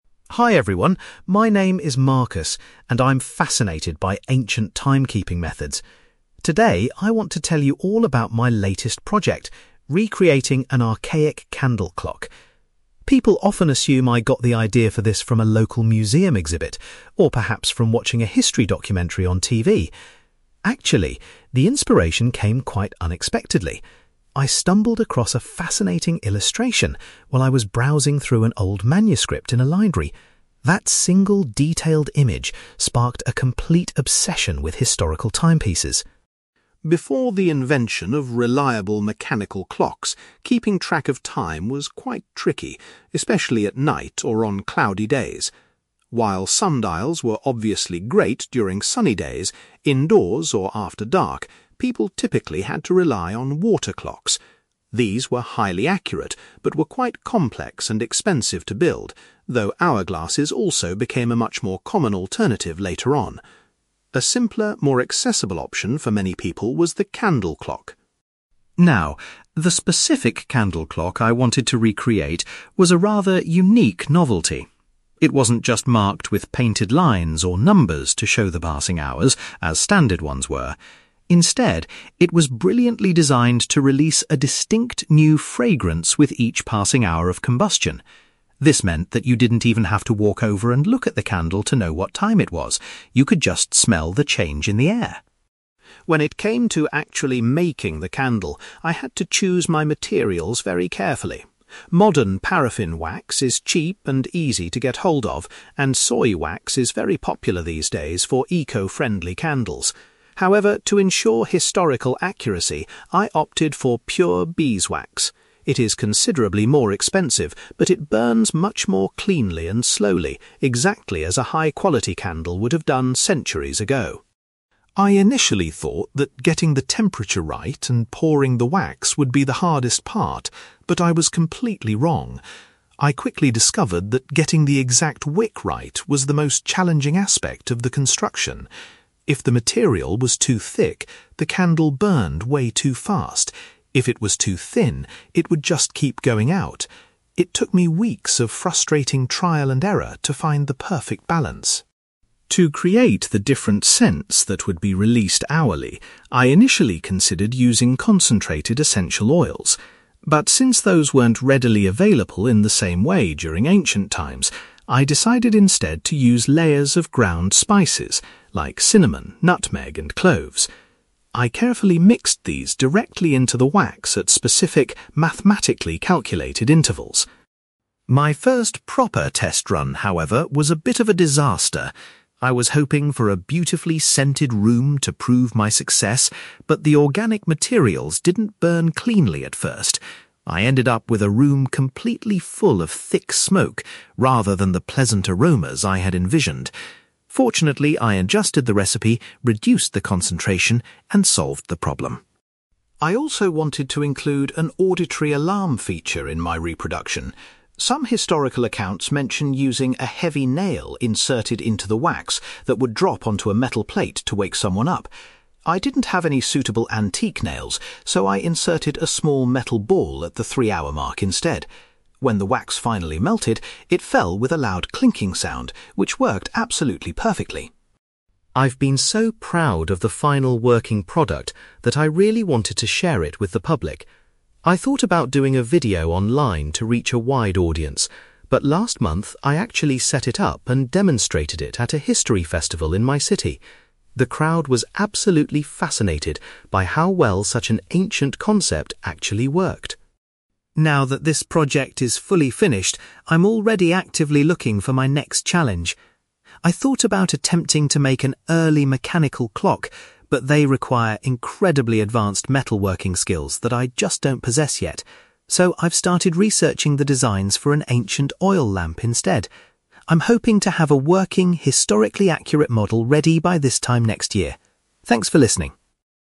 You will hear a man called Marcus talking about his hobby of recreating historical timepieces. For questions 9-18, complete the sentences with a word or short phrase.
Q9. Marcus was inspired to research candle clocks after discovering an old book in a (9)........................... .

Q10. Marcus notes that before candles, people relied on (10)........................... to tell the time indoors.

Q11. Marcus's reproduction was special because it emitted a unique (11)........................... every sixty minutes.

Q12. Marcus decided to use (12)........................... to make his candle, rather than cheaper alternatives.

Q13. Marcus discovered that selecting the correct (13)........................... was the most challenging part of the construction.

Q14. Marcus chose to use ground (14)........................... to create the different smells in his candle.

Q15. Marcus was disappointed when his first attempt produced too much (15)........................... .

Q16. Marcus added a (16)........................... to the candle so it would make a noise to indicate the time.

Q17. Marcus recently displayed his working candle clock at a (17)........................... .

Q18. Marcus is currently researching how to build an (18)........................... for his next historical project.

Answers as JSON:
{"9": "library", "10": "water clocks", "11": "fragrance", "12": "beeswax", "13": "wick", "14": "spices", "15": "smoke", "16": "metal ball", "17": "history festival", "18": "oil lamp"}

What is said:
Marcus: Hi everyone, my name is Marcus, and I'm fascinated by ancient timekeeping methods. Today I want to tell you all about my latest project: recreating an archaic candle clock. People often assume I got the idea for this from a local museum exhibit, or perhaps from watching a history documentary on TV. Actually, the inspiration came quite unexpectedly. I stumbled across a fascinating illustration while I was browsing through an old manuscript in a library. That single, detailed image sparked a complete obsession with historical timepieces.
Before the invention of reliable mechanical clocks, keeping track of time was quite tricky, especially at night or on cloudy days. While sundials were obviously great during sunny days, indoors or after dark, people typically had to rely on water clocks. These were highly accurate but were quite complex and expensive to build, though hourglasses also became a much more common alternative later on. A simpler, more accessible option for many people was the candle clock.
Now, the specific candle clock I wanted to recreate was a rather unique novelty. It wasn't just marked with painted lines or numbers to show the passing hours, as standard ones were. Instead, it was brilliantly designed to release a distinct new fragrance with each passing hour of combustion. This meant that you didn't even have to walk over and look at the candle to know what time it was; you could just smell the change in the air!
When it came to actually making the candle, I had to choose my materials very carefully. Modern paraffin wax is cheap and easy to get hold of, and soy wax is very popular these days for eco-friendly candles. However, to ensure historical accuracy, I opted for pure beeswax. It is considerably more expensive, but it burns much more cleanly and slowly, exactly as a high-quality candle would have done centuries ago.
I initially thought that getting the temperature right and pouring the wax would be the hardest part, but I was completely wrong. I quickly discovered that getting the exact wick right was the most challenging aspect of the construction. If the material was too thick, the candle burned way too fast; if it was too thin, it would just keep going out. It took me weeks of frustrating trial and error to find the perfect balance.
To create the different scents that would be released hourly, I initially considered using concentrated essential oils. But since those weren't readily available in the same way during ancient times, I decided instead to use layers of ground spices, like cinnamon, nutmeg, and cloves. I carefully mixed these directly into the wax at specific, mathematically calculated intervals.
My first proper test run, however, was a bit of a disaster. I was hoping for a beautifully scented room to prove my success, but the organic materials didn't burn cleanly at first. I ended up with a room completely full of thick smoke, rather than the pleasant aromas I had envisioned! Fortunately, I adjusted the recipe, reduced the concentration, and solved the problem.
I also wanted to include an auditory alarm feature in my reproduction. Some historical accounts mention using a heavy nail inserted into the wax that would drop onto a metal plate to wake someone up. I didn't have any suitable antique nails, so I inserted a small metal ball at the three-hour mark instead. When the wax finally melted, it fell with a loud 'clinking' sound, which worked absolutely perfectly.
I've been so proud of the final working product that I really wanted to share it with the public. I thought about doing a video online to reach a wide audience, but last month, I actually set it up and demonstrated it at a history festival in my city. The crowd was absolutely fascinated by how well such an ancient concept actually worked.
Now that this project is fully finished, I'm already actively looking for my next challenge. I thought about attempting to make an early mechanical clock, but they require incredibly advanced metalworking skills that I just don't possess yet. So, I've started researching the designs for an ancient oil lamp instead. I'm hoping to have a working, historically accurate model ready by this time next year. Thanks for listening!

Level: B2